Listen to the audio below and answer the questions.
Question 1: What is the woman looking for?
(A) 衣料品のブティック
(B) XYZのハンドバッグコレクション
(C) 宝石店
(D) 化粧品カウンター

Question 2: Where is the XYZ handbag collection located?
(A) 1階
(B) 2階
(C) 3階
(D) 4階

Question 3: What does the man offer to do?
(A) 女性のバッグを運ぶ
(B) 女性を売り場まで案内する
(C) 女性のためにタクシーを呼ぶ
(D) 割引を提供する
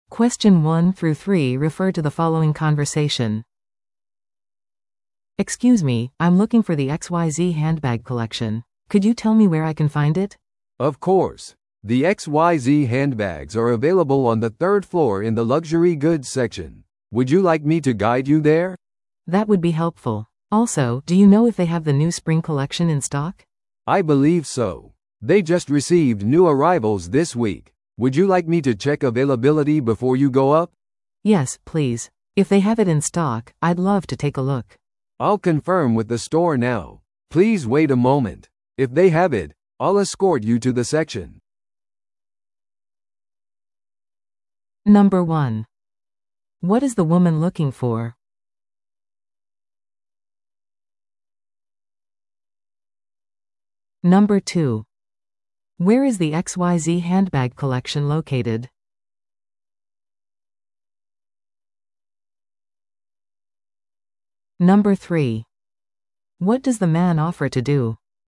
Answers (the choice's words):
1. XYZのハンドバッグコレクション
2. 3階
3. 女性を売り場まで案内する

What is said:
A: "Excuse me, I'm looking for the XYZ handbag collection. Could you tell me where I can find it?"
B: "Of course. The XYZ handbags are available on the third floor in the luxury goods section. Would you like me to guide you there?"
A: "That would be helpful. Also, do you know if they have the new spring collection in stock?"
B: "I believe so. They just received new arrivals this week. Would you like me to check availability before you go up?"
A: "Yes, please. If they have it in stock, I'd love to take a look."
B: "I'll confirm with the store now. Please wait a moment. If they have it, I'll escort you to the section."